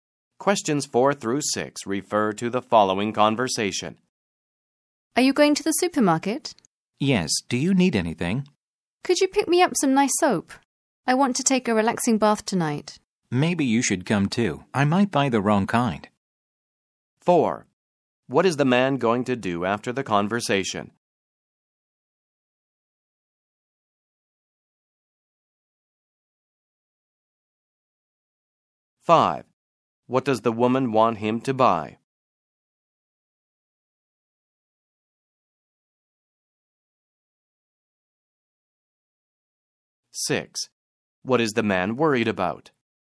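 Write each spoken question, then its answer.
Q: What does the woman want him to buy?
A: Some nice soap

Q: What is the man worried about?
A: Buying the wrong kind of soap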